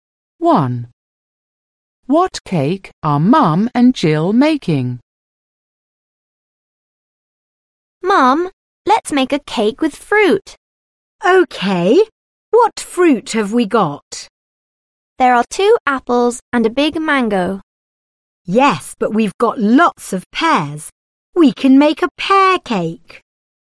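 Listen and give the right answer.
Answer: A pear cake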